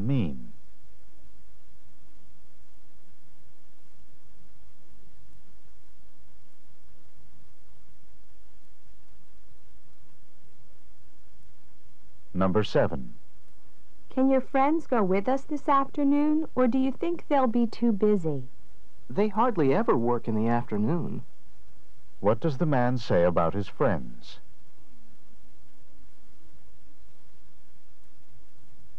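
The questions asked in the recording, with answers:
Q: What does the man say about his friends?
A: They are usually free in the afternoon.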